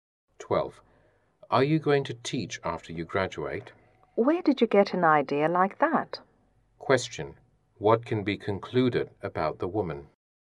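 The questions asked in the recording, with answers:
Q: What can be concluded about the woman?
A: She doesn't plan to teach after graduating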